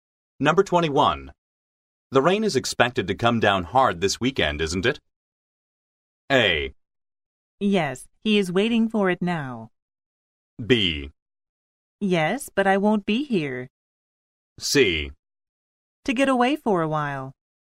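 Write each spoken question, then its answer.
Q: The rain is expected to come down hard this weekend, isn't it?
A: B: Yes, but I won't be here.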